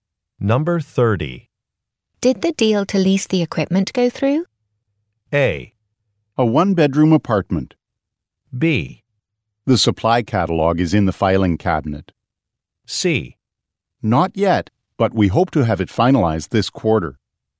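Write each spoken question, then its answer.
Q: Did the deal to lease the equipment go through?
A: C: Not yet, but we hope to have it finalized this quarter.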